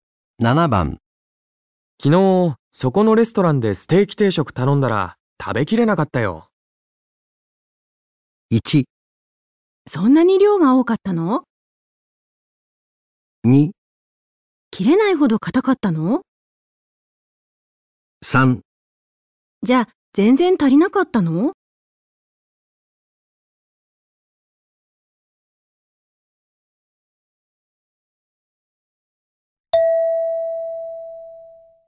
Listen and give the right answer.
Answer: 1

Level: N2 Listening · Test 3